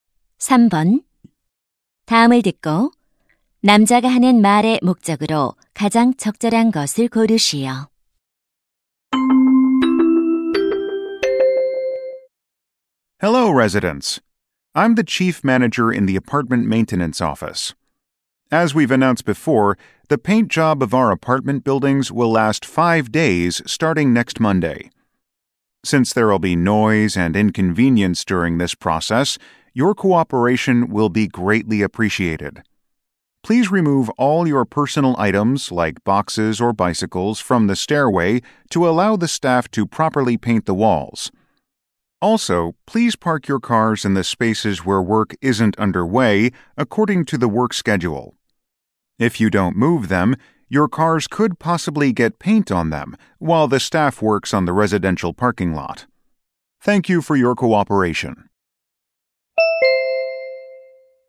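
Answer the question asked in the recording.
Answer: 아파트 도색 작업에 대한 협조를 요청하려고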